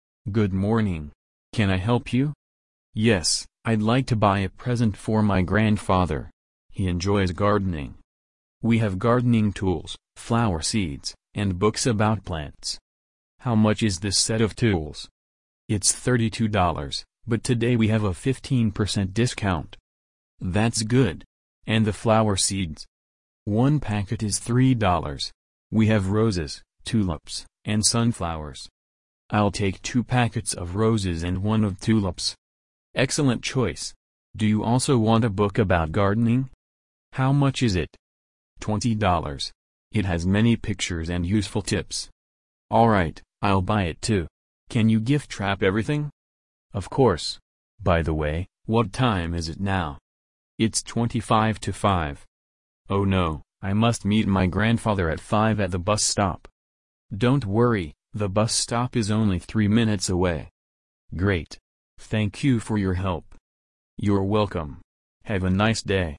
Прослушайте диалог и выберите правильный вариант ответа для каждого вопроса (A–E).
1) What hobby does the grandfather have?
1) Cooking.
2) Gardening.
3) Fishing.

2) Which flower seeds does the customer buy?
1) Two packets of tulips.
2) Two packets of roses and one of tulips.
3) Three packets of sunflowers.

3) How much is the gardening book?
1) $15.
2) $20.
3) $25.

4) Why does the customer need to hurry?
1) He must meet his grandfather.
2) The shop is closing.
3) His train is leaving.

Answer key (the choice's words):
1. Gardening.
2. Two packets of roses and one of tulips.
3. $20.
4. He must meet his grandfather.

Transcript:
– Good morning! Can I help you?
– Yes, I'd like to buy a present for my grandfather. He enjoys gardening.
– We have gardening tools, flower seeds, and books about plants.
– How much is this set of tools?
– It's $32, but today we have a 15% discount.
– That's good. And the flower seeds?
– One packet is $3. We have roses, tulips, and sunflowers.
– I'll take two packets of roses and one of tulips.
– Excellent choice. Do you also want a book about gardening?
– $20. It has many pictures and useful tips.
– All right, I'll buy it too. Can you gift-wrap everything?
– Of course. By the way, what time is it now?
– Oh no, I must meet my grandfather at five at the bus stop.
– Don't worry, the bus stop is only three minutes away.
– Great. Thank you for your help!
– You're welcome. Have a nice day!

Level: 7kl